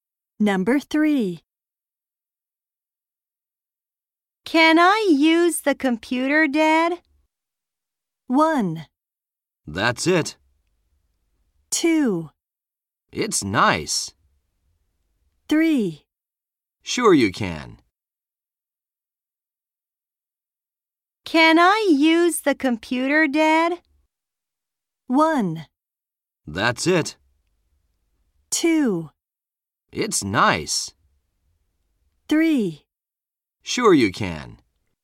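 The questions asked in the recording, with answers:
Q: Can I use the computer, Dad?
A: 3: Sure you can.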